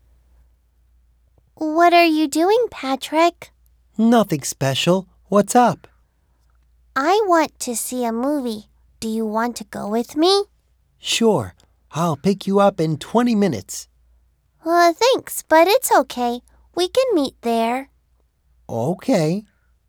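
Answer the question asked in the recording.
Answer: To the cinema to see a movie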